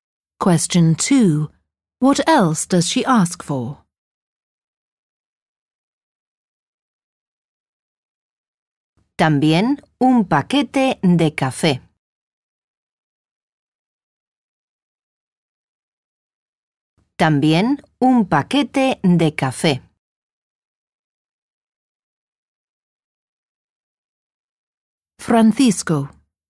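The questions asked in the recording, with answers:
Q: What else does she ask for?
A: A packet of coffee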